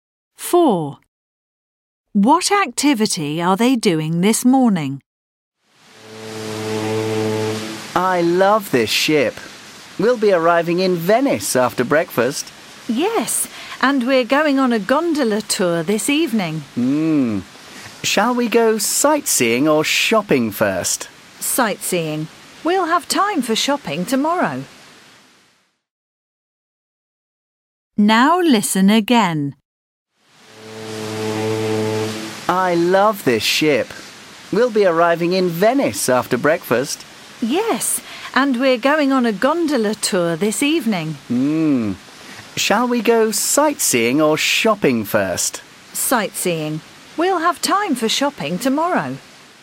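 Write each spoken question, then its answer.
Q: What activity are they doing this morning?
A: Sightseeing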